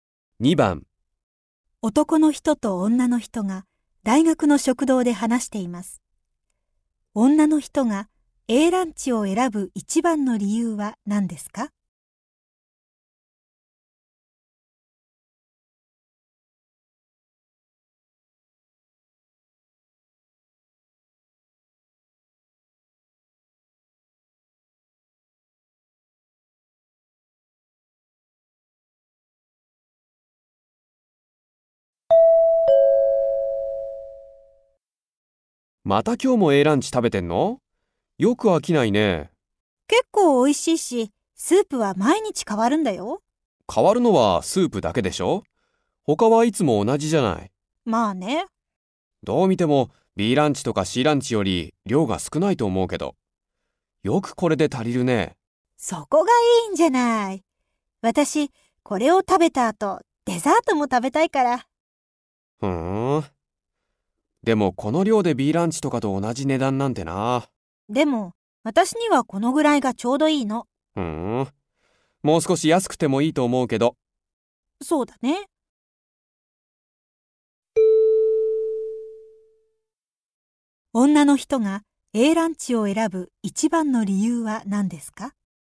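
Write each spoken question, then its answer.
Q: 女の人が A ランチを選ぶ一番の理由は何ですか?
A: 量が少なく、食後にデザートも食べられるから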